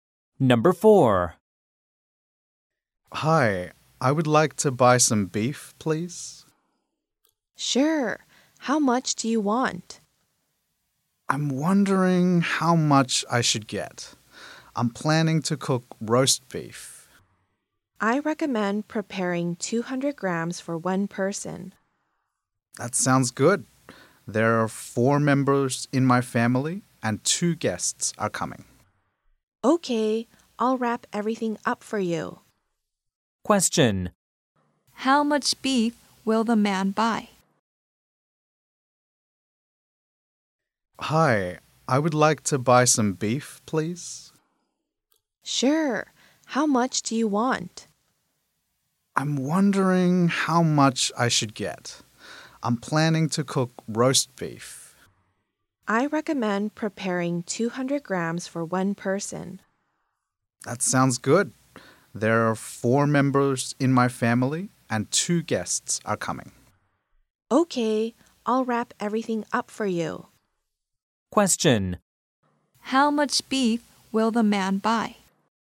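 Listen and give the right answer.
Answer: 1,200 grams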